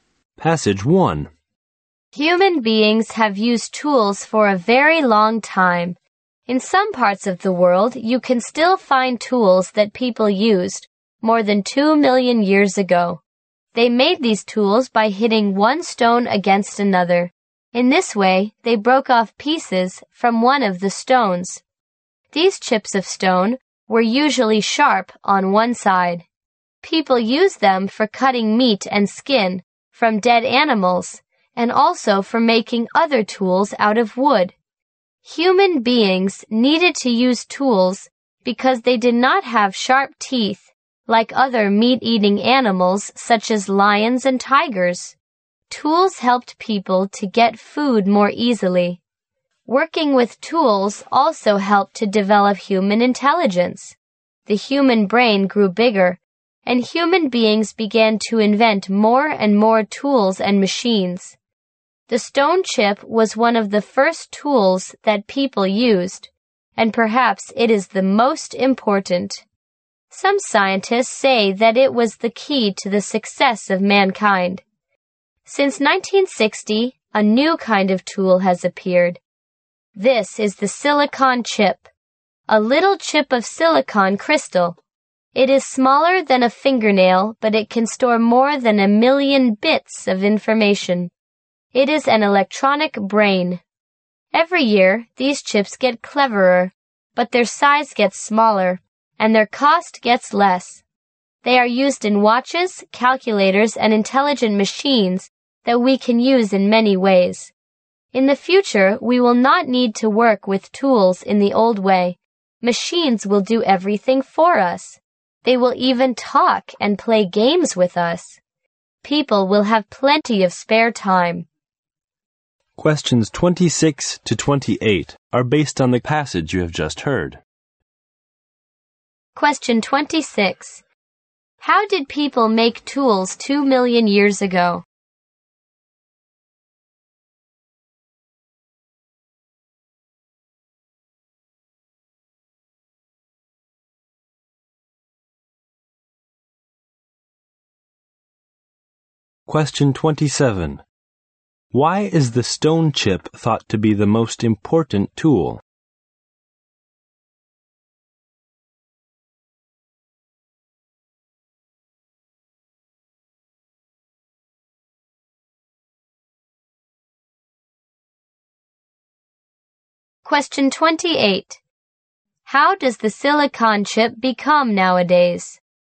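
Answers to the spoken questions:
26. By hitting one stone against another
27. It was the key to the success of mankind
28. Cleverer, smaller and cheaper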